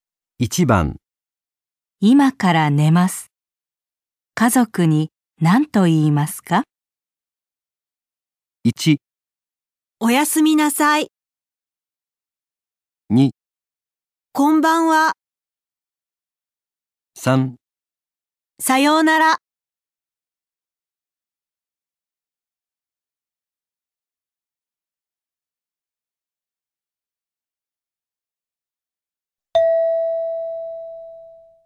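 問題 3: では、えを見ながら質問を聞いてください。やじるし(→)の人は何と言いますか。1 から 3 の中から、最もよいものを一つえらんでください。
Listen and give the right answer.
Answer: おやすみなさい。

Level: N5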